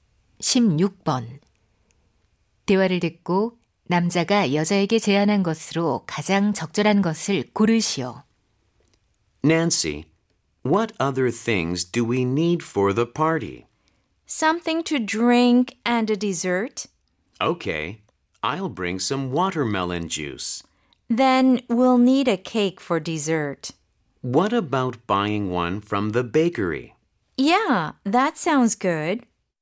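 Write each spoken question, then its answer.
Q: 대화를 듣고 남자가 여자에게 제안한 것으로 가장 적절한 것을 고르시오.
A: 빵집에서 케이크 사기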